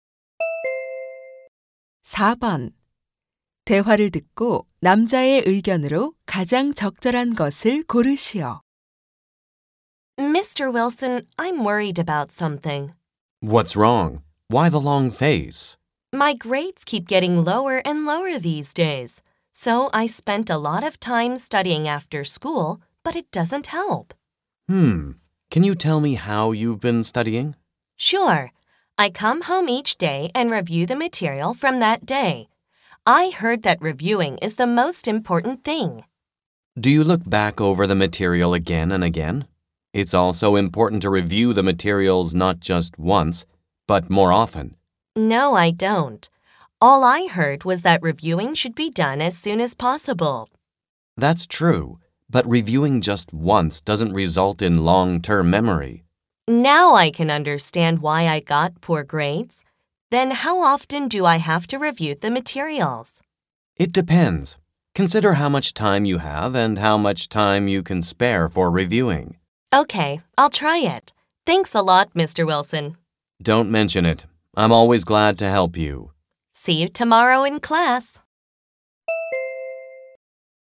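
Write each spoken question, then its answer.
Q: 대화를 듣고 남자의 의견으로 가장 적절한 것을 고르시오.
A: 학습 내용은 한 번이 아니라 여러 번 반복해서 복습해야 한다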